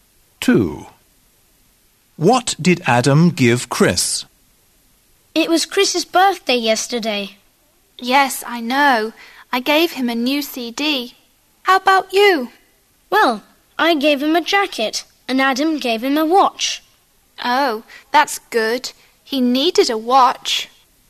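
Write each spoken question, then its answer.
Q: What did Adam give Chris?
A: a watch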